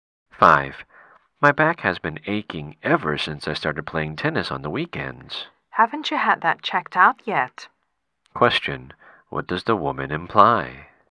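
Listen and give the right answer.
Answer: The man should have his back checked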